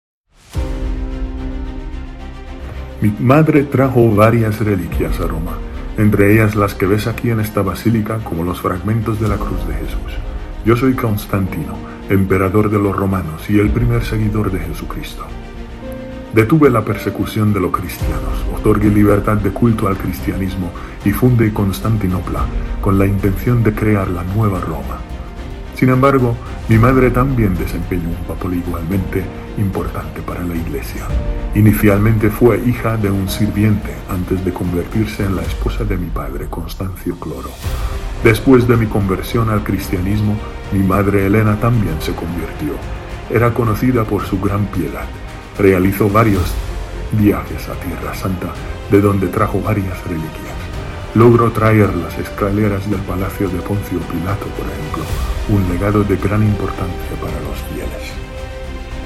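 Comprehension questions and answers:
¿Qué ciudad fundó el Emperador Constantino como la "Nueva Roma"?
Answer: Constantinopla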